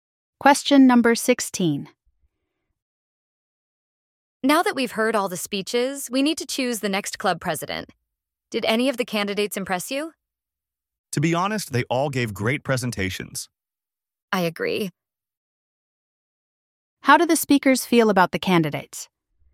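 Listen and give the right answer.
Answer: They were all impressive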